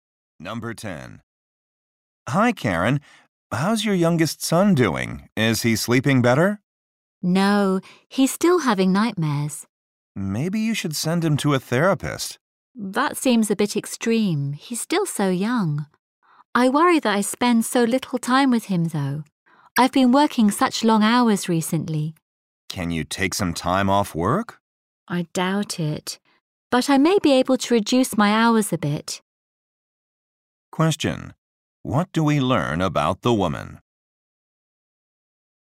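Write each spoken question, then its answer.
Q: What do we learn about the woman?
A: She has been working long hours and worries she spends too little time with her son.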